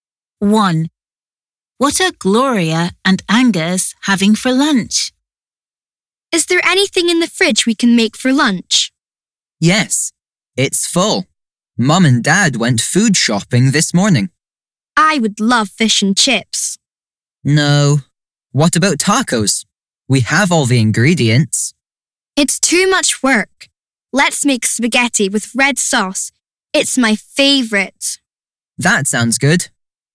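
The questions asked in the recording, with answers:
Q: What are Gloria and Angus having for lunch?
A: Spaghetti with red sauce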